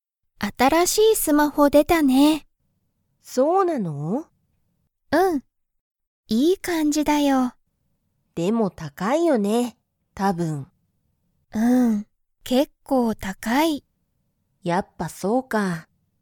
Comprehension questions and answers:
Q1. その新(あたら)しいスマホは、いい感(かん)じですか?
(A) はい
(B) いいえ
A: (A) はい

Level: Level 1

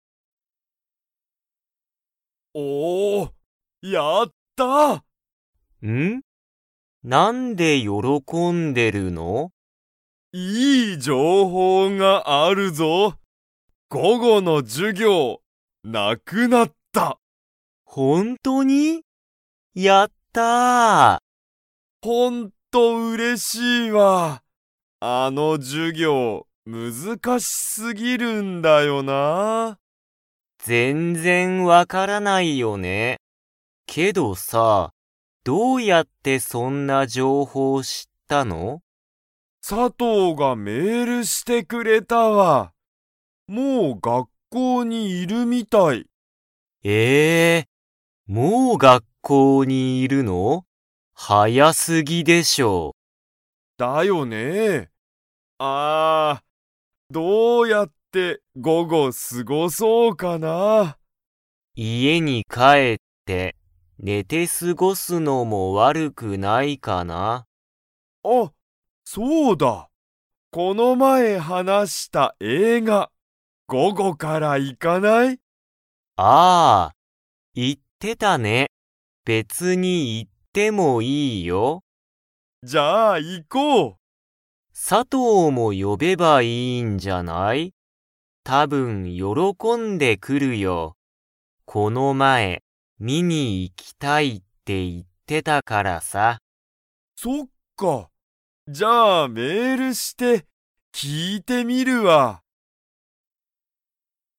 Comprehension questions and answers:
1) 「いい情報じょうほう」とは何なんですか?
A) 授業じゅぎょうが難むずかしすぎる。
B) 佐藤さとうがメールしてくれた。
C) 午後ごごの授業じゅぎょうがなくなった。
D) 午後ごご、映画えいがを見みに行いく。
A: C) 午後ごごの授業じゅぎょうがなくなった。

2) コウジは、佐藤さとうにメール 。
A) する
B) しない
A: A) する

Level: Level 3

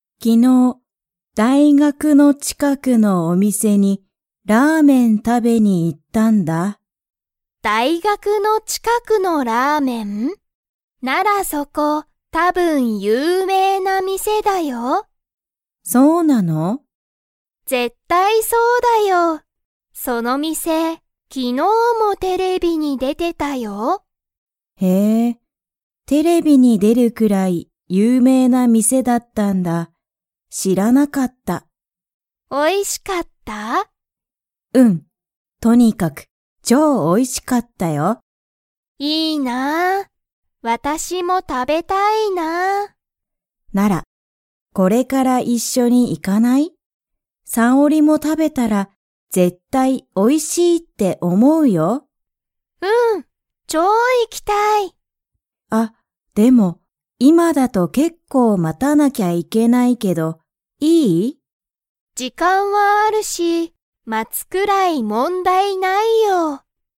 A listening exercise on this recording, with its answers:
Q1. 大学(だいがく)の近(ちか)くのラーメンの店(みせ)は、____な店みせだ。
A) きれい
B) 大変(たいへん)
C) 絶対(ぜったい)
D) 有名(ゆうめい)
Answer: D) 有名(ゆうめい)

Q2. ハルカとサオリは、これからラーメンを食(た)べに行(い)きますか?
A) はい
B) いいえ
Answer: A) はい

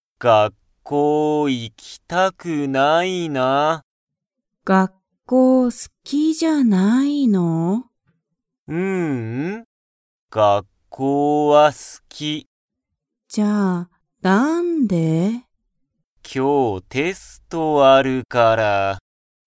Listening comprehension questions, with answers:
タカシは学校(がっこう)が好(す)きですか?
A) はい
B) いいえ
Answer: A) はい

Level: Level 1

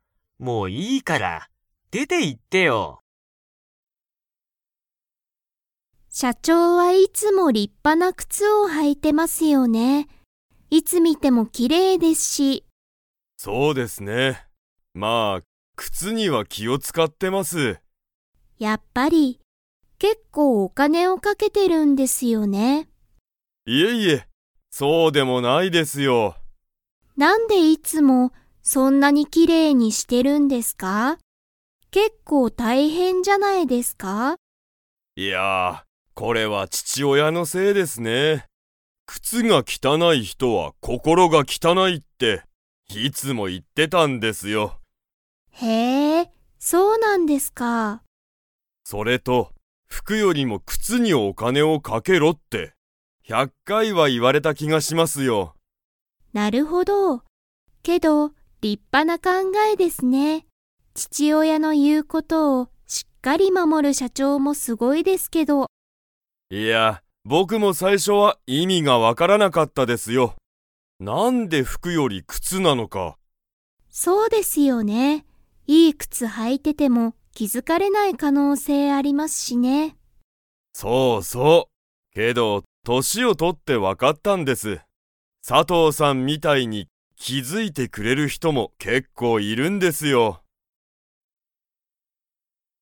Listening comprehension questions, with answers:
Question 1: 木村きむらさんは、何なにに気きを使つかっていますか?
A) 靴くつ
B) 服ふく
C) 父親ちちおや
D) お金かね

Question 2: 木村きむらさんは、父親ちちおやの言いうことを 。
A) 守まもっている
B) 守まもっていない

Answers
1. A) 靴くつ
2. A) 守まもっている

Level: Level 4

